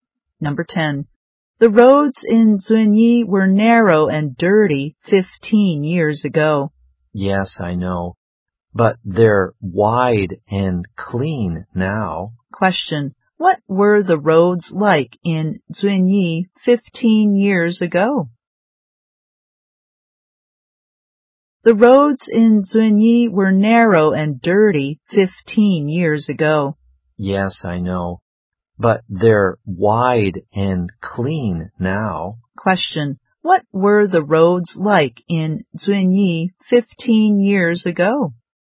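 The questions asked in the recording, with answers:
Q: What were the roads like in Zunyi 15 years ago?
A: Narrow and dirty.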